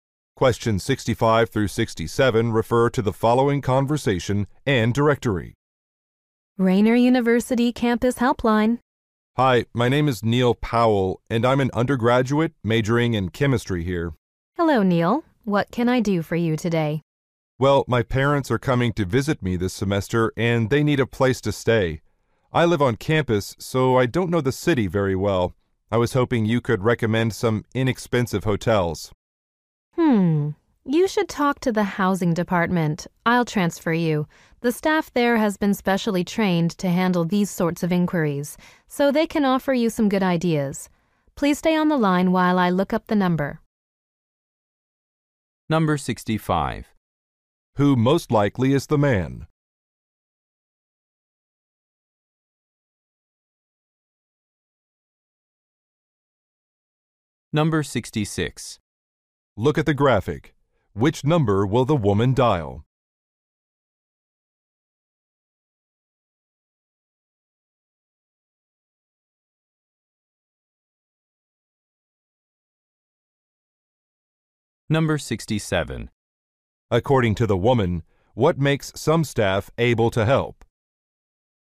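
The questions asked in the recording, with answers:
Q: Who most likely is the man?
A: A chemistry student

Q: According to the woman, what makes some staff able to help?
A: Special training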